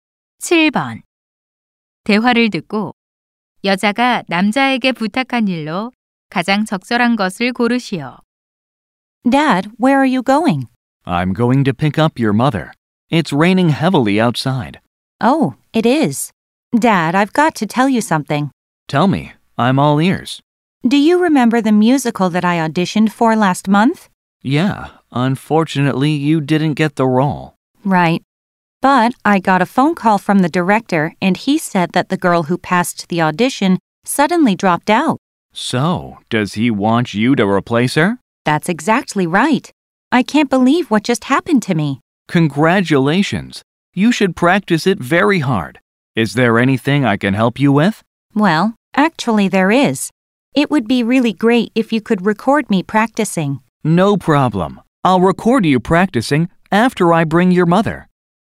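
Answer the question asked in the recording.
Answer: 연습하는 모습 녹화해 주기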